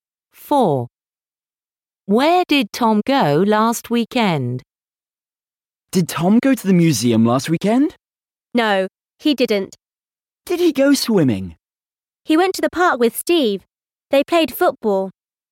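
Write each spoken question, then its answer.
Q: Where did Tom go last weekend?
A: to the park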